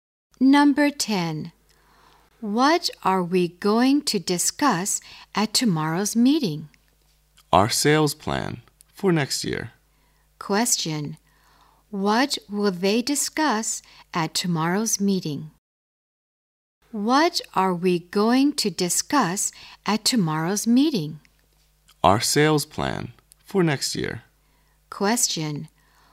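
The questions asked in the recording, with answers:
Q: What will they discuss at tomorrow's meeting?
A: Their sales plan for next year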